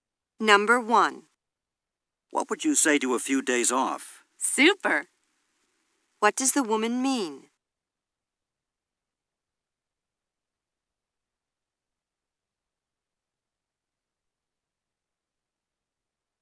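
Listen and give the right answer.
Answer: She would love a few days off.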